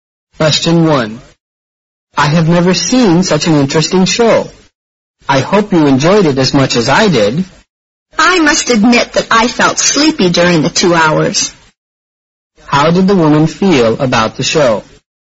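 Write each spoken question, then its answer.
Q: How did the woman feel about the show?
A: She found it boring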